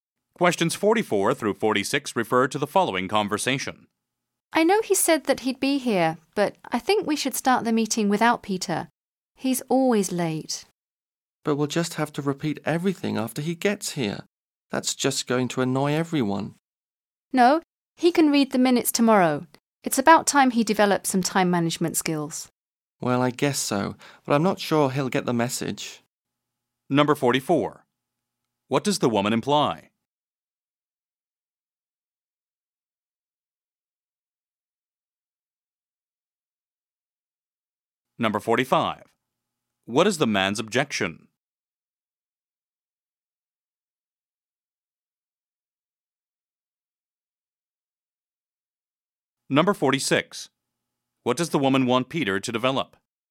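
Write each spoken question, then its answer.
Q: What does the woman imply?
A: They should start the meeting without Peter because he is always late

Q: What is the man's objection?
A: They would have to repeat everything when Peter arrives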